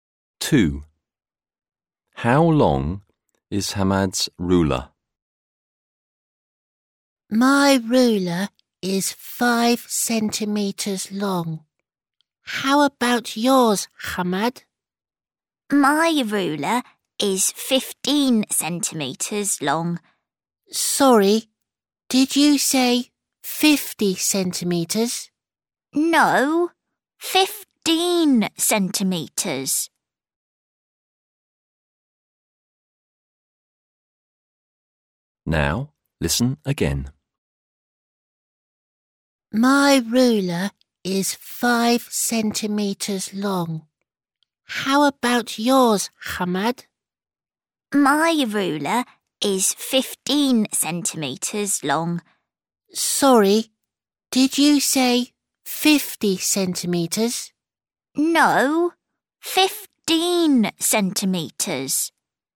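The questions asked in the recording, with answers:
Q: How long is Hamad's ruler?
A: 15 centimetres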